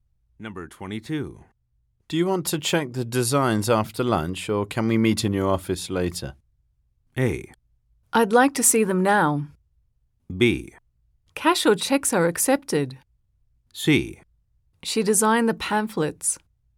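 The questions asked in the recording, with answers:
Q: Do you want to check the designs after lunch, or can we meet in your office later?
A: A: I'd like to see them now.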